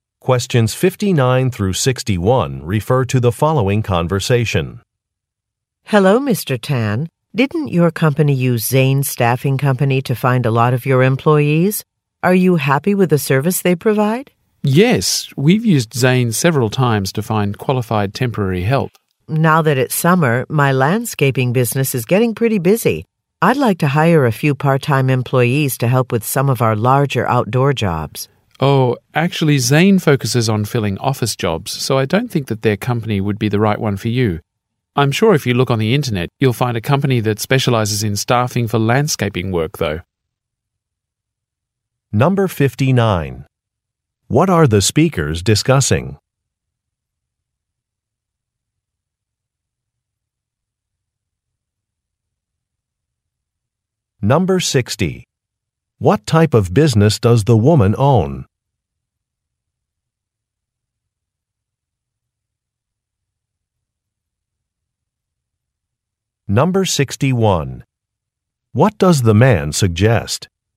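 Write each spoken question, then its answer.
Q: What are the speakers discussing?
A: A staffing company's services

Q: What type of business does the woman own?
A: A landscaping business

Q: What does the man suggest?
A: Searching the internet for a company that specializes in staffing for landscaping work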